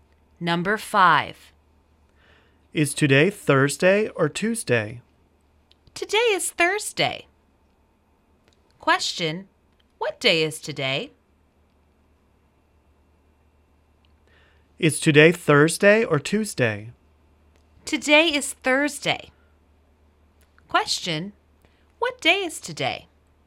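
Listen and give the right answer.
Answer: Thursday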